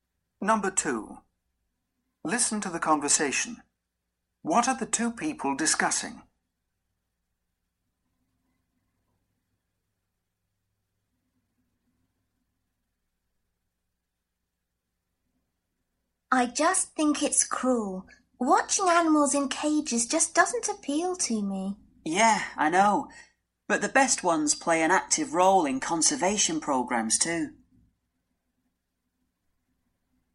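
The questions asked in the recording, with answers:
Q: What are the two people discussing?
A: Zoos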